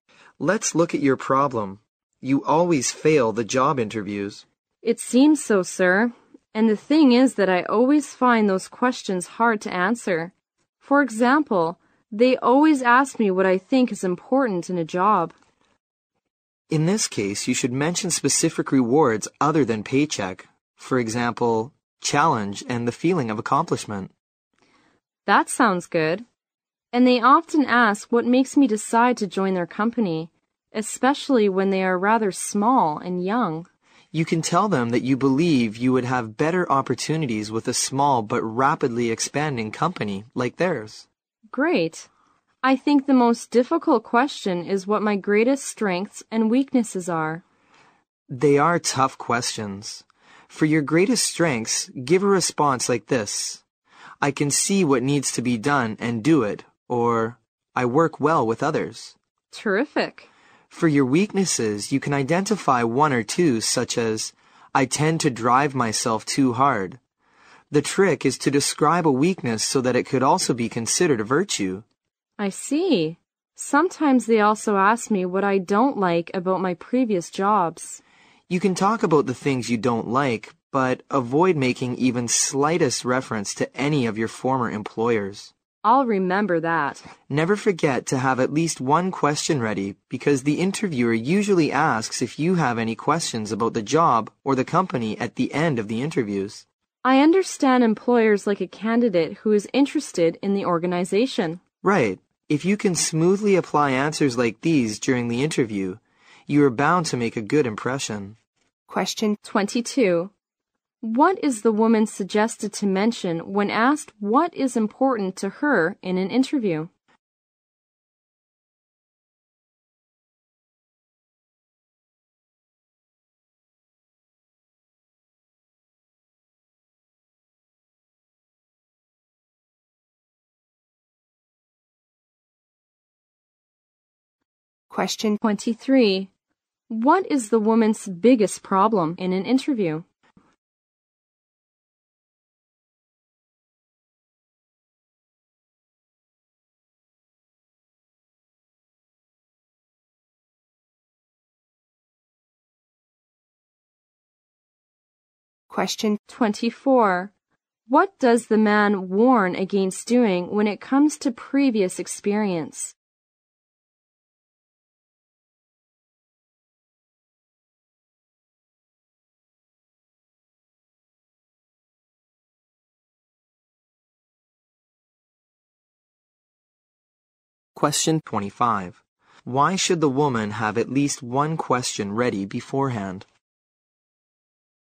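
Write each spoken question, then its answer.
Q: What is the woman suggested to mention when asked what is important to her in an interview?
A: Specific rewards other than paycheck, such as challenge and a feeling of accomplishment

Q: What does the man warn against doing when it comes to previous experience?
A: Making any reference to her former employers

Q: Why should the woman have at least one question ready beforehand?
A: Employers like a candidate who is interested in the organization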